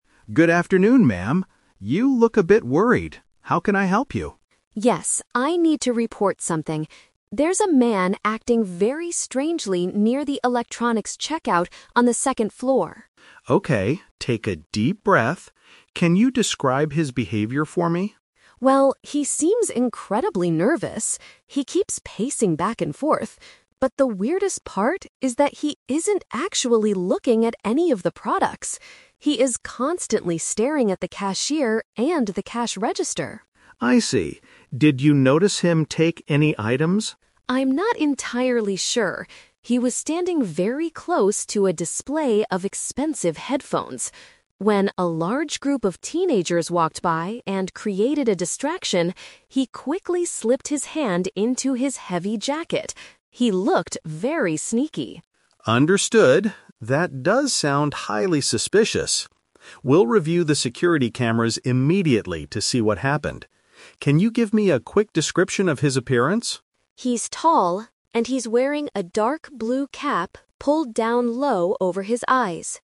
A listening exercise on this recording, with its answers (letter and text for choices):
Listen to a conversation between a shopper and a mall security guard. For each question, choose the correct answer A, B, or (C).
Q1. What was the man doing that made the shopper suspicious?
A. He was arguing loudly with the electronics cashier.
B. He was paying close attention to the checkout staff.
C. He was trying to open the store's cash register.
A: B. He was paying close attention to the checkout staff.

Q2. When did the man hide his hand inside his jacket?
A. While some young people were walking past him.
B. While the shopper was asking him a question.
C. While the cashier was looking at the security cameras.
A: A. While some young people were walking past him.

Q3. What does the security guard plan to do NEXT?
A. Ask the shopper to point the man out in the store.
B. Call the local police department for assistance.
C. Check the video footage of the electronics area.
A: C. Check the video footage of the electronics area.

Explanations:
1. The shopper says the man "is constantly staring at the cashier." The phrase "paying close attention to the checkout staff" is a B1-level paraphrase for staring at the cashier.
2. The shopper explains that the man slipped his hand into his jacket "when a large group of teenagers walked by." The phrase "young people" is a synonym for teenagers.
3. The security guard states, "We'll review the security cameras immediately." Checking "video footage" is exactly the same as reviewing security cameras.

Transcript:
Security Guard: Good afternoon, ma'am. You look a bit worried. How can I help you?
Shopper: Yes, I need to report something. There's a man acting very strangely near the electronics checkout on the second floor.
Security Guard: Okay, take a deep breath. Can you describe his behavior for me?
Shopper: Well, he seems incredibly nervous. He keeps pacing back and forth. But the weirdest part is that he isn't actually looking at any of the products. He is constantly staring at the cashier and the cash register.
Security Guard: I see. Did you notice him take any items?
Shopper: I'm not entirely sure. He was standing very close to a display of expensive headphones. When a large group of teenagers walked by and created a distraction, he quickly slipped his hand into his heavy jacket. He looked very sneaky.
Security Guard: Understood. That does sound highly suspicious. We'll review the security cameras immediately to see what happened. Can you give me a quick description of his appearance?
Shopper: He's tall, and he's wearing a dark blue cap pulled down low over his eyes.